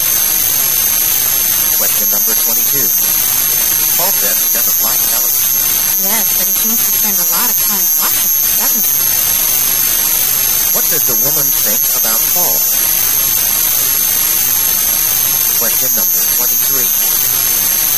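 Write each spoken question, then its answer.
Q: What does the woman think about Paul?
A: He watches a lot of television despite what he says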